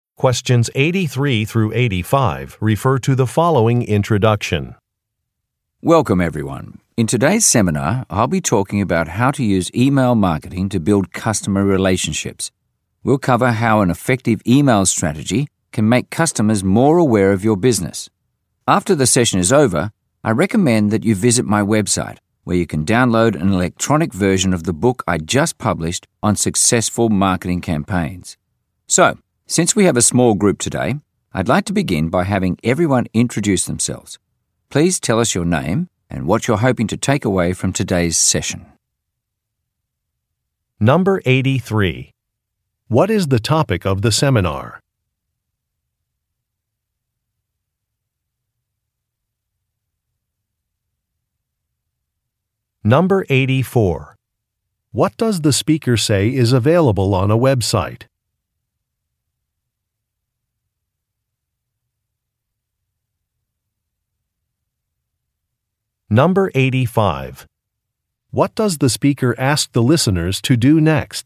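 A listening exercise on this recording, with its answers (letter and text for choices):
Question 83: What is the topic of the seminar?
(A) Finance basics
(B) Marketing strategies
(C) Manufacturing processes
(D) Hiring procedures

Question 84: What does the speaker say is available on a Web site?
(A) An electronic book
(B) Different payment options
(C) Free legal advice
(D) Printable certificates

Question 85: What does the speaker ask the listeners to do next?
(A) Introduce themselves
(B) Hand in some paperwork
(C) Read a short paragraph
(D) Listen to some examples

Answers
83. (B) Marketing strategies
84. (A) An electronic book
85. (A) Introduce themselves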